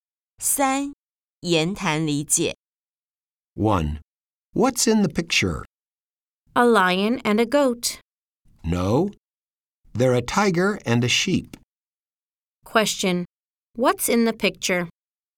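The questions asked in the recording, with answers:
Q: What's in the picture?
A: A tiger and a sheep.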